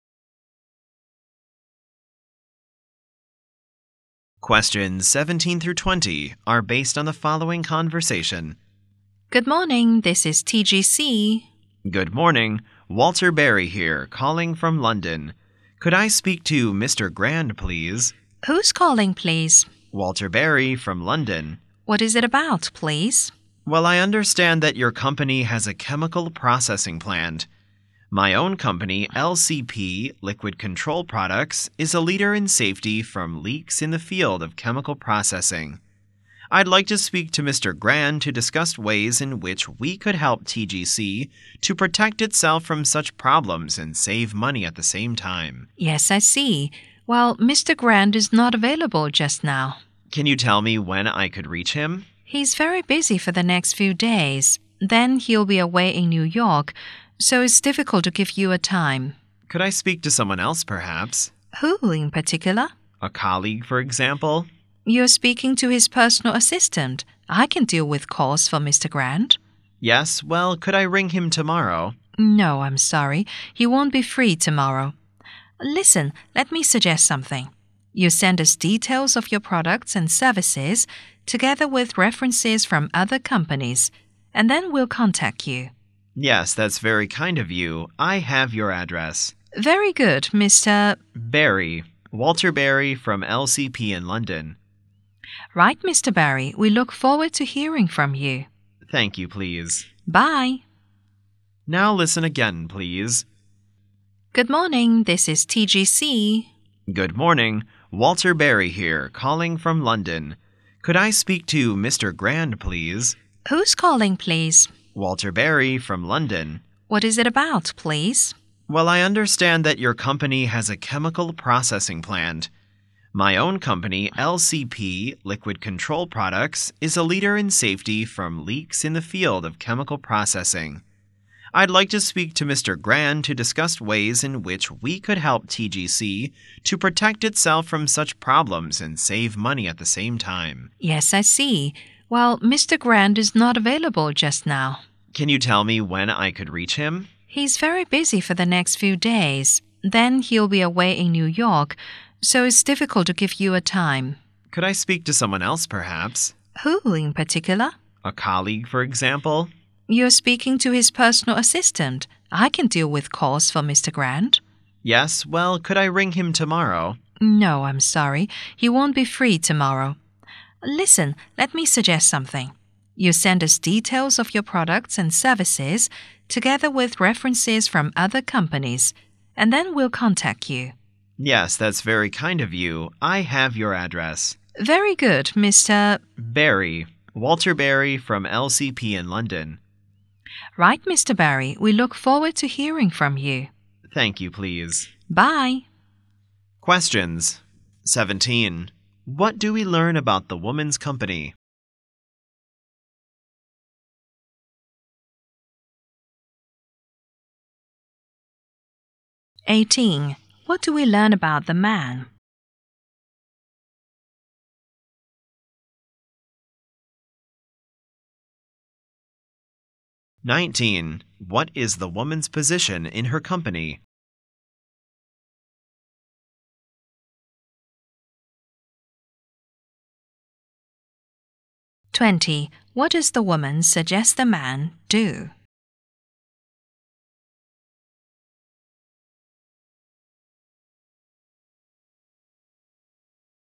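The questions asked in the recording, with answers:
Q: What do we learn about the woman's company?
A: It has a chemical processing plant

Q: What do we learn about the man?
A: He works for LCP in London, selling leak safety products

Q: 19. What is the woman's position in her company?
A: Mr. Grand's personal assistant

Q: 20. What does the woman suggest the man do?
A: Send details of his products and services with references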